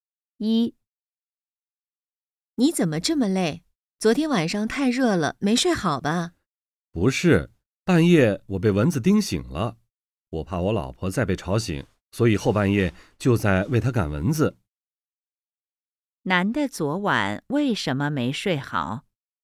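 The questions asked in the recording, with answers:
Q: 男的昨晚为什么没睡好?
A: 半夜被蚊子叮醒了,后半夜在为老婆赶蚊子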